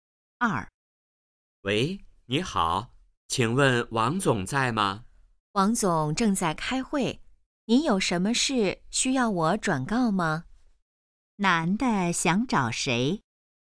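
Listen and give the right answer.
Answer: 王总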